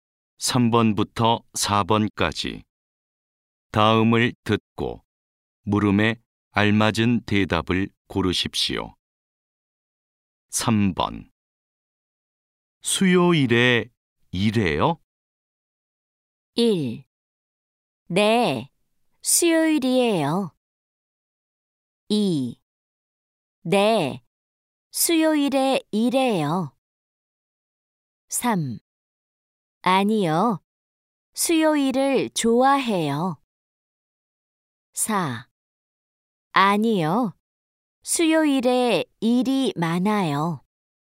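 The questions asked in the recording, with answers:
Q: 수요일에 일해요?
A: 2: 네, 수요일에 일해요.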